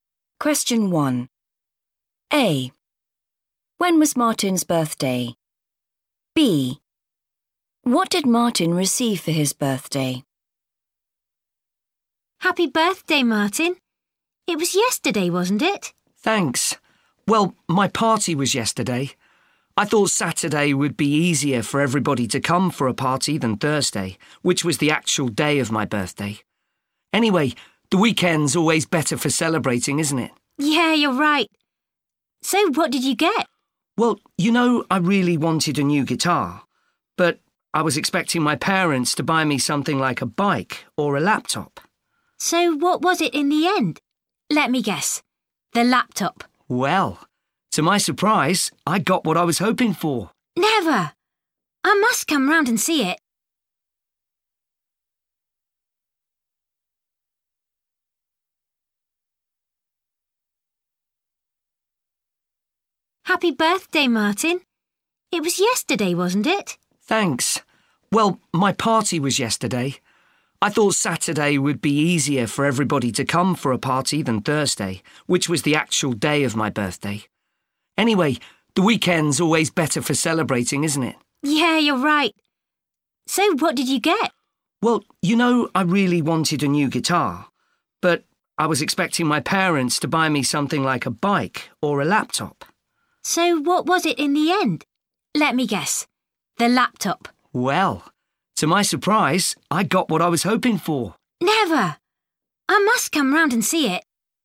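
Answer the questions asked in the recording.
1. Thursday
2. a (new) guitar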